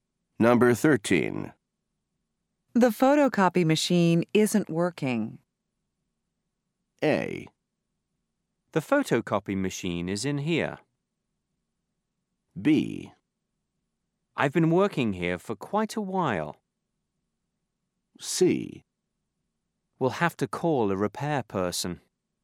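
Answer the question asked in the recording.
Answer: C: We'll have to call a repair person.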